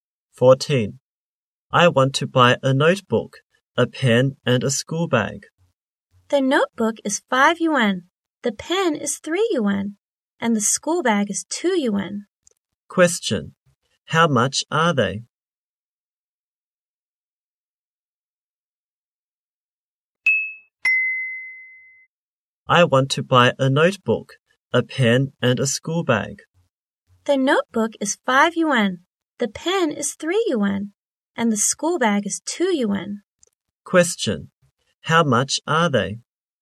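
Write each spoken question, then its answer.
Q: How much are they?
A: 10 yuan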